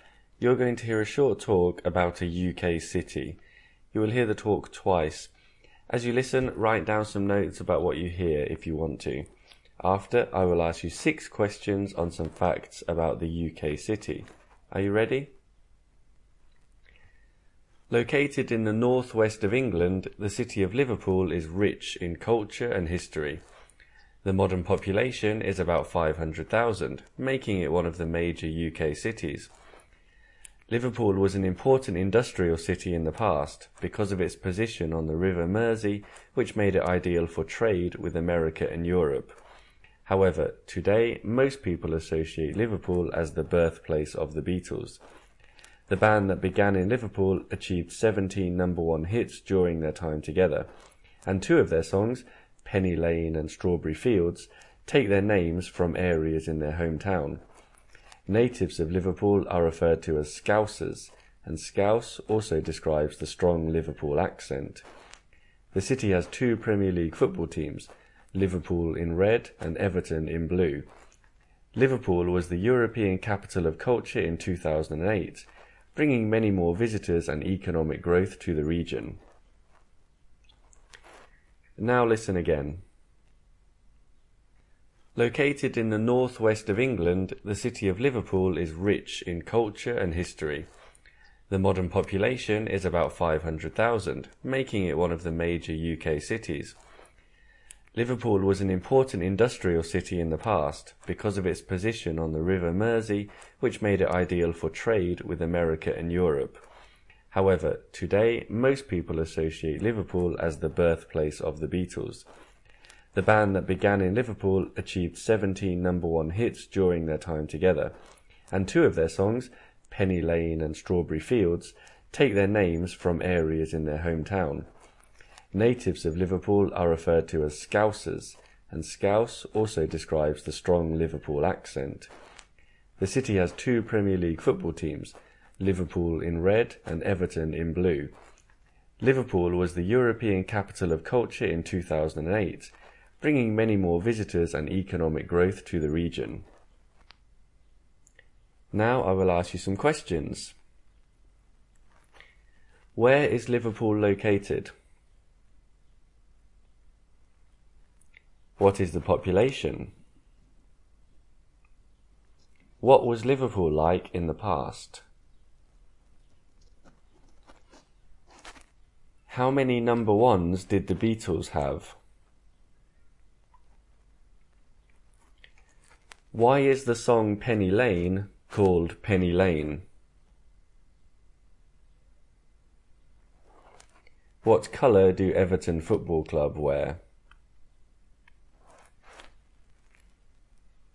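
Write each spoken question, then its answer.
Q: Where is Liverpool located?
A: In the northwest of England

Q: What is the population?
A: About 500,000

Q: What was Liverpool like in the past?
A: An important industrial city

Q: How many number ones did the Beatles have?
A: 17

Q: Why is the song Penny Lane called Penny Lane?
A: It takes its name from an area in Liverpool

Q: What colour do Everton Football Club wear?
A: Blue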